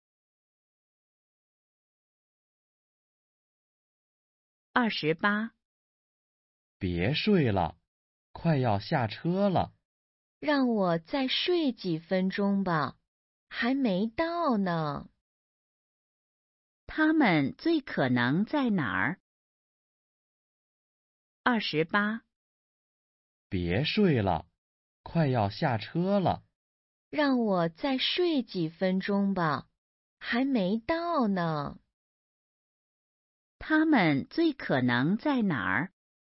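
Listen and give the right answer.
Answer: 车上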